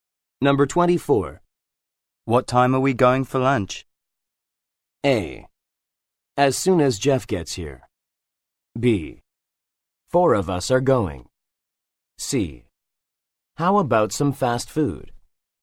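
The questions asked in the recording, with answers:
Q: What time are we going for lunch?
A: A: As soon as Jeff gets here.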